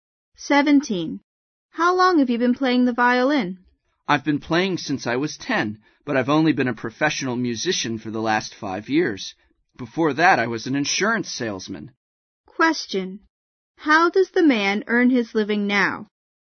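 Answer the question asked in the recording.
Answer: As a professional musician (violinist)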